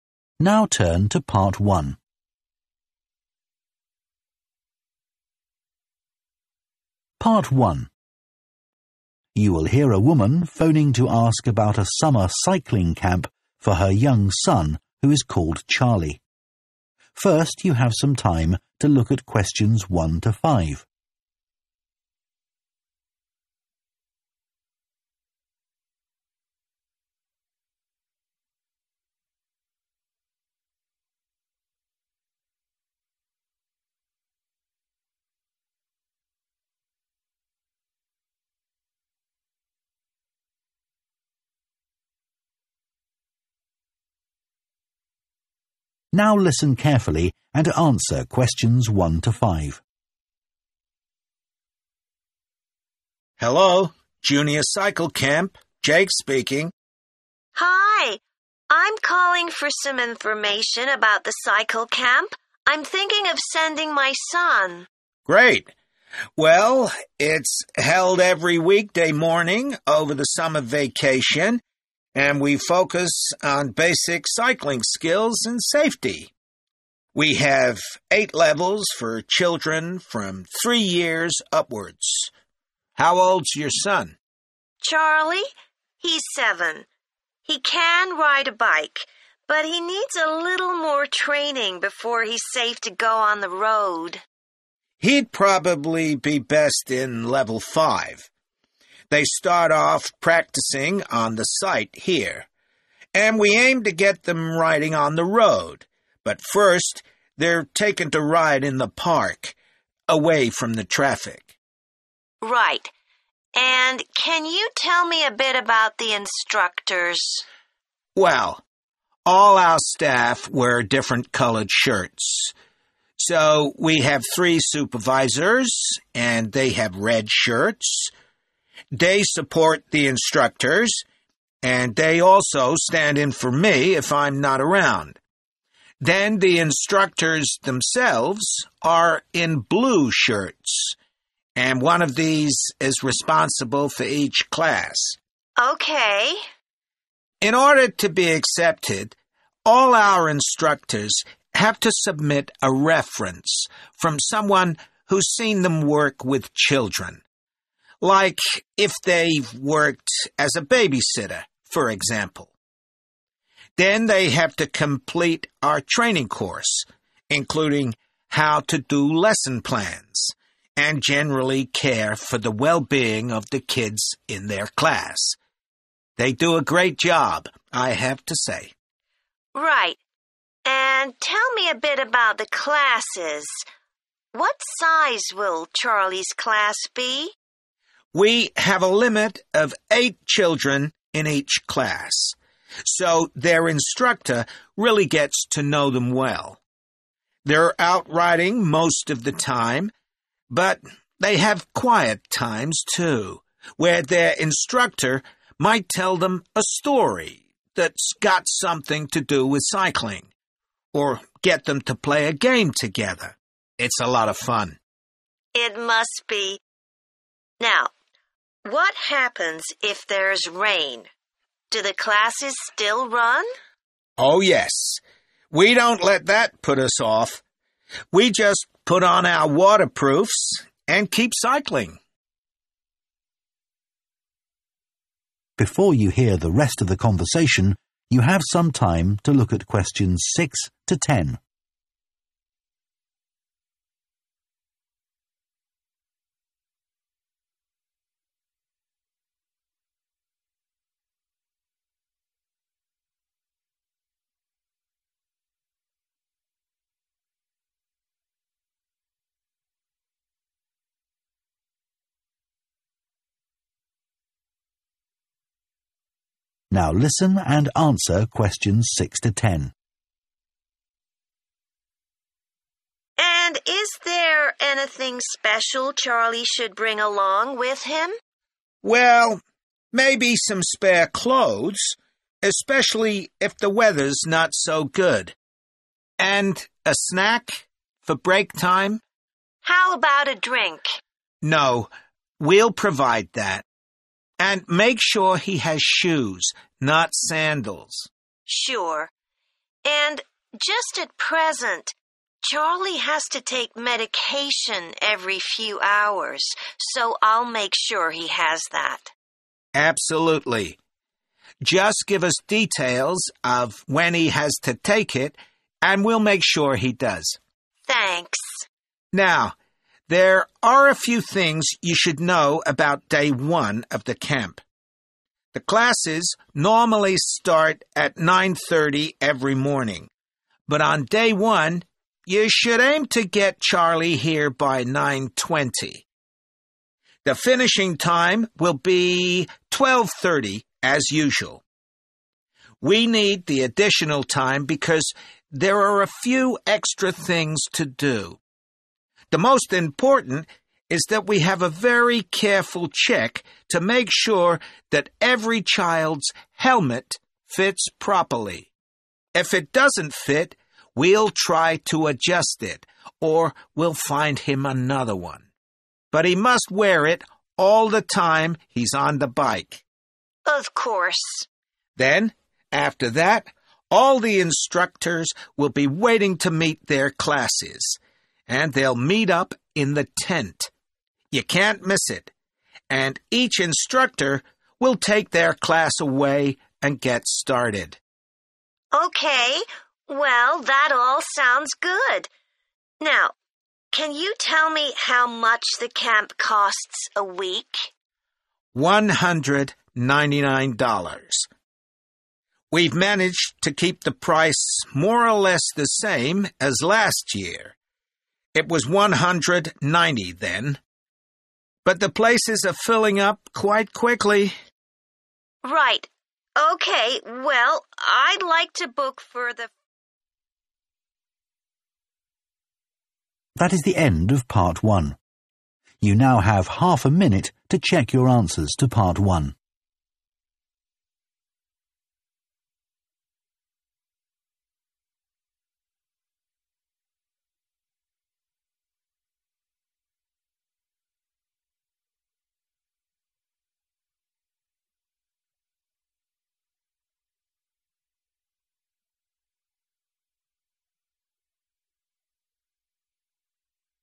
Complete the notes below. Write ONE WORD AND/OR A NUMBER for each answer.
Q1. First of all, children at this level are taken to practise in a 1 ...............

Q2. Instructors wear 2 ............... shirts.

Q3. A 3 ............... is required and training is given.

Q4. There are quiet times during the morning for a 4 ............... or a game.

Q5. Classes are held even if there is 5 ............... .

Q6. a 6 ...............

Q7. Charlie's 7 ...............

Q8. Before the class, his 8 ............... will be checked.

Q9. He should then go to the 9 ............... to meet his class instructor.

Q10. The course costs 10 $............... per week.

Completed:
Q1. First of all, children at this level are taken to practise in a park
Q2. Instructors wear blue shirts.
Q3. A reference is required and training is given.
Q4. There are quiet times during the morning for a story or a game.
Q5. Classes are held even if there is rain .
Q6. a snack
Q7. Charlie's medication
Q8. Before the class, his helmet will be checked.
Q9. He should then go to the tent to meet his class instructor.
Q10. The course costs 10 $199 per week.